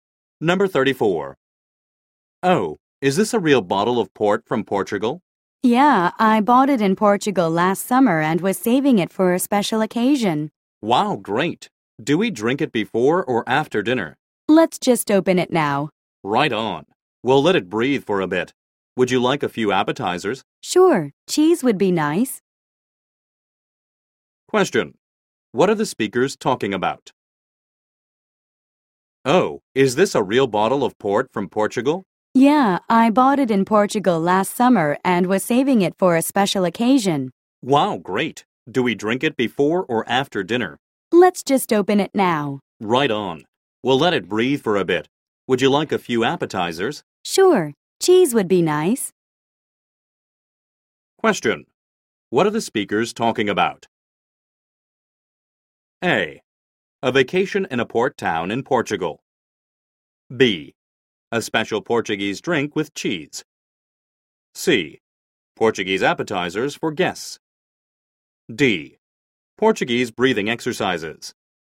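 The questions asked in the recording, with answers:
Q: What are the speakers talking about?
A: B: A special Portuguese drink with cheese.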